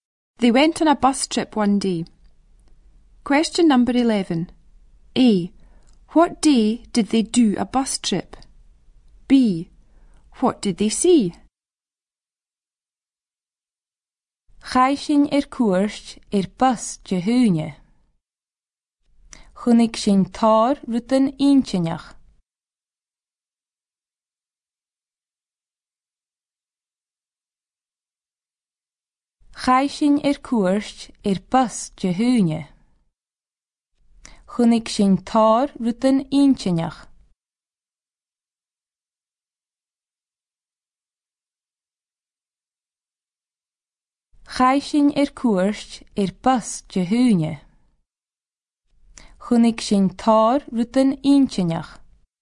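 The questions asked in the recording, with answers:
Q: What did they see?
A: Lots of interesting things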